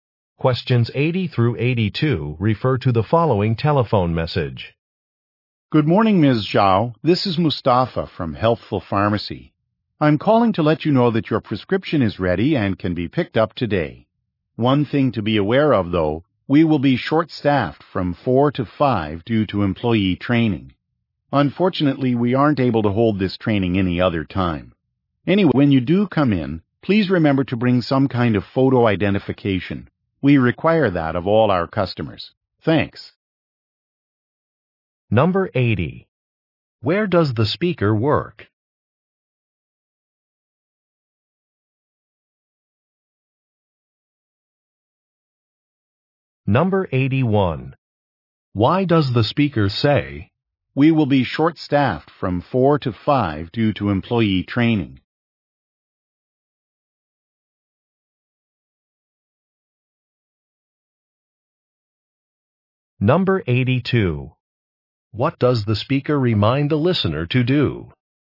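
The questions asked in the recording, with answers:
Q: Where does the speaker work?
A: At a pharmacy

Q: What does the speaker remind the listener to do?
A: Bring photo identification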